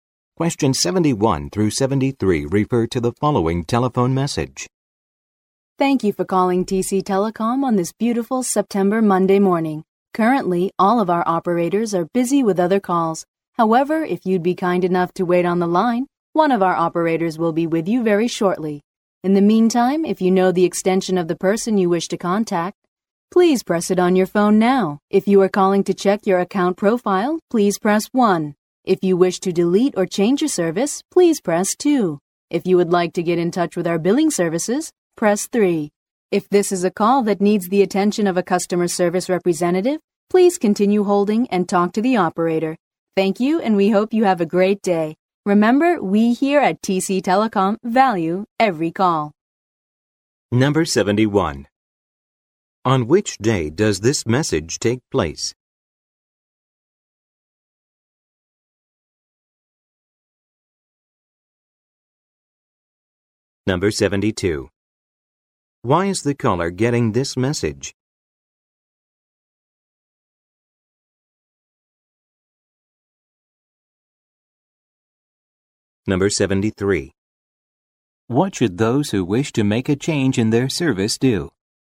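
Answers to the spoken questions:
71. Monday
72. All operators are busy
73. Press 2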